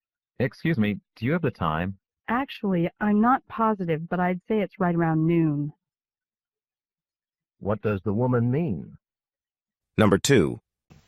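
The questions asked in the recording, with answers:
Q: What does the woman mean?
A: She isn't sure, but it's about noon.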